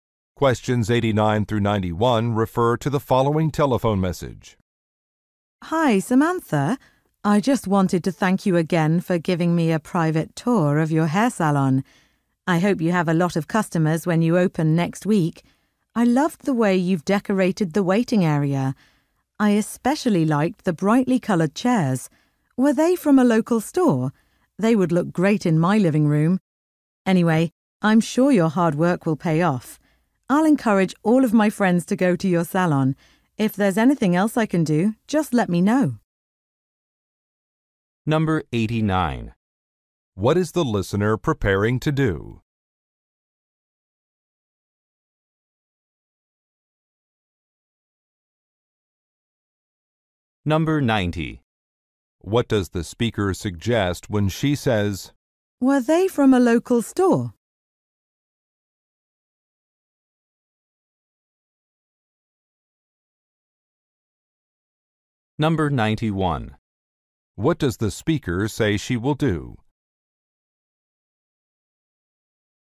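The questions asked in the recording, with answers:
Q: What is the listener preparing to do?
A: Open a hair salon

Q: What does the speaker suggest when she says,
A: She wants to buy similar chairs

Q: What does the speaker say she will do?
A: Recommend the salon to her friends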